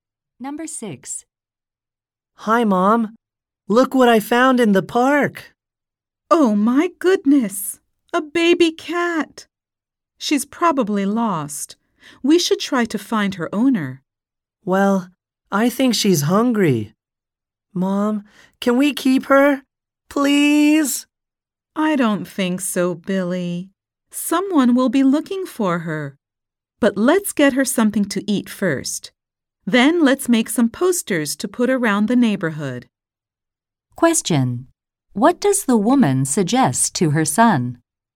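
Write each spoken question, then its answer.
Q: What does the woman suggest to her son?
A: Feed the cat and make posters to find its owner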